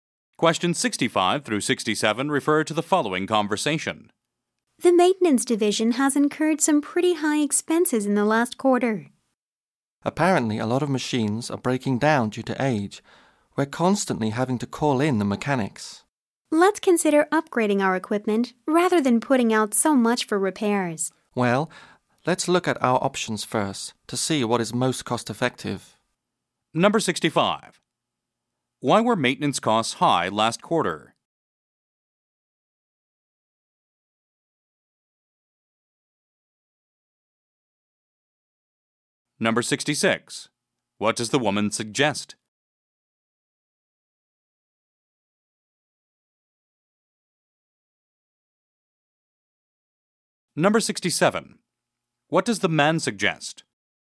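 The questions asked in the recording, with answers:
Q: Why were maintenance costs high last quarter?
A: Old machines kept breaking down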